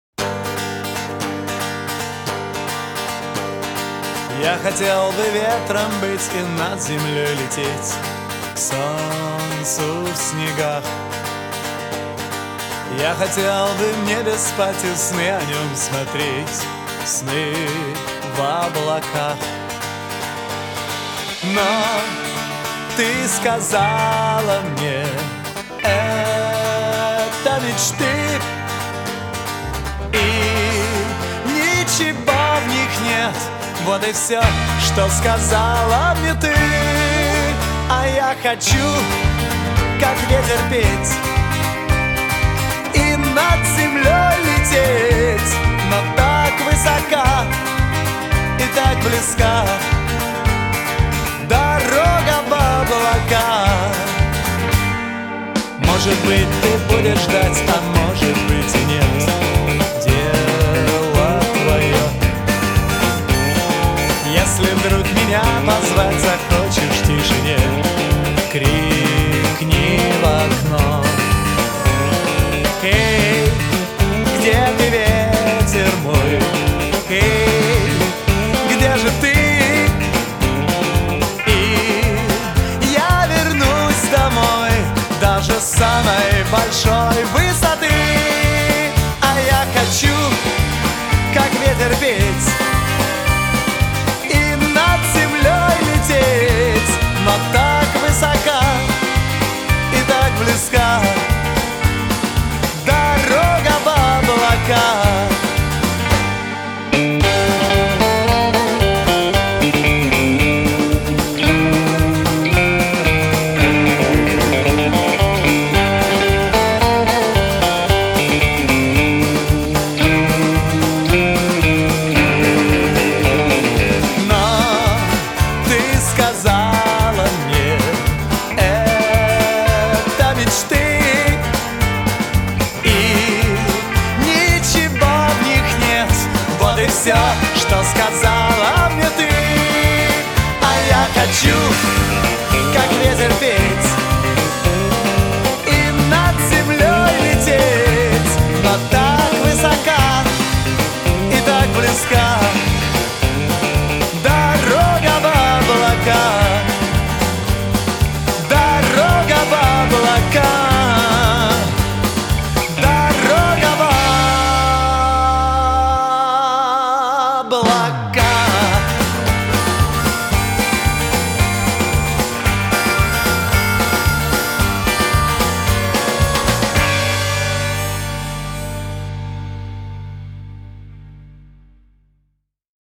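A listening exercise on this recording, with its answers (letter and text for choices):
2. Выберите правильный вариант ответа:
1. Герой песни хотел бы стать:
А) солнцем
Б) ветром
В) облаком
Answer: Б) ветром

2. Герой мечтает видеть в своих снах:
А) небо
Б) любимую девушку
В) дорогу домой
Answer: А) небо

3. Девушка думает, что мечты героя...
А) серьёзные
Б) глупые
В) прекрасные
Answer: Б) глупые

1.Скажите, правильно или неправильно. Исправьте неправильные утверждения.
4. Герой песни мечтает полететь в космос.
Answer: неправильно: он хочет лететь над землёй к солнцу

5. Любимая героя не понимает его увлечения полётами.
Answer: правильно

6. Герой точно знает, что дома его никто не будет ждать.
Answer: неправильно: может быть, она будет ждать, а может быть и нет

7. Герой песни обещает своей любимой вернуться домой, если она позовёт его.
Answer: правильно

3. Ответьте на вопросы.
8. Куда хочет лететь герой?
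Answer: над землёй к солнцу, в облака

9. Где он хочет спать и что он хочет видеть во сне?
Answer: в небе; сны о небе

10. О чём ещё мечтает герой песни?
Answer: петь, как ветер

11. Вернётся ли герой к своей девушке, если она позовёт его?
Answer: да, даже с самой большой высоты

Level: А2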